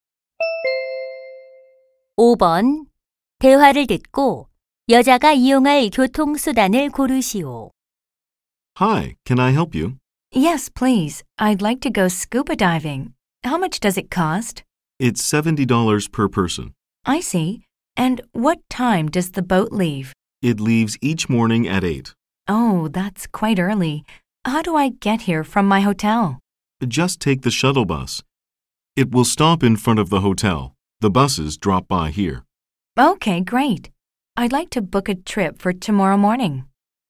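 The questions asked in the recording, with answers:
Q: 대화를 듣고 여자가 이용할 교통수단을 고르시오.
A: 셔틀버스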